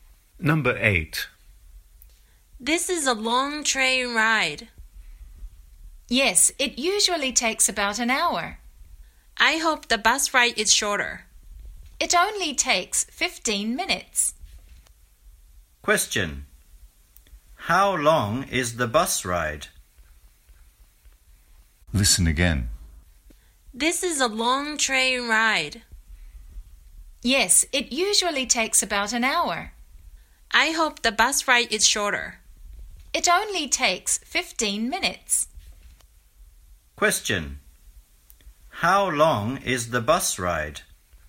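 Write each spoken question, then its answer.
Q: How long is the bus ride?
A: About 15 minutes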